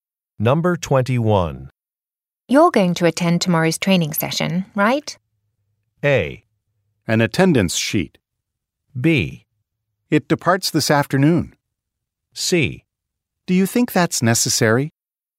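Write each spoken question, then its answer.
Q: You're going to attend tomorrow's training session, right?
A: C: Do you think that's necessary?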